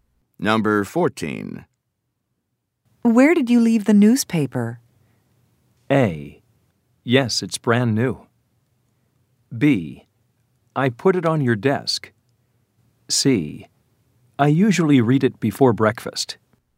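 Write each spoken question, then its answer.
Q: Where did you leave the newspaper?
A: B: I put it on your desk.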